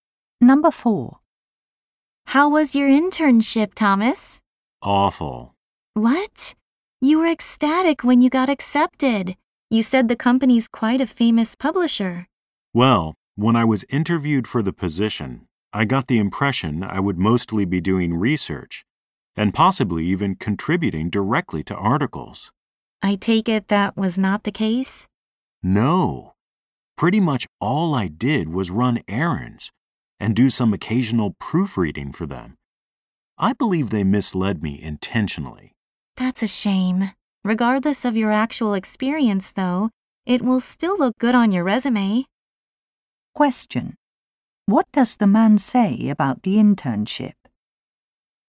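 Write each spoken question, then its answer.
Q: What does the man say about the internship?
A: He mostly ran errands instead of research, and thinks the company misled him.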